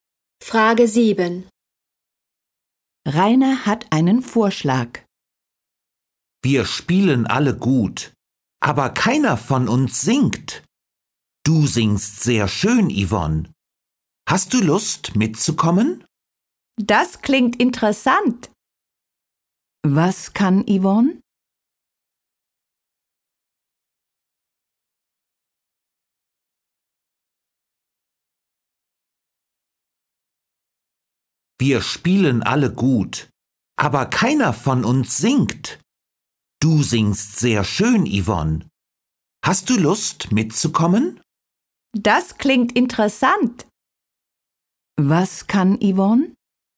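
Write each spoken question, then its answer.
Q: Was kann Yvonne?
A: Sehr schön singen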